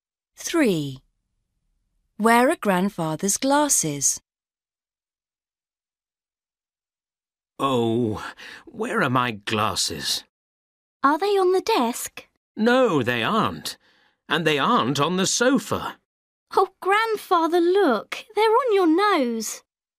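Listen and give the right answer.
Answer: on his nose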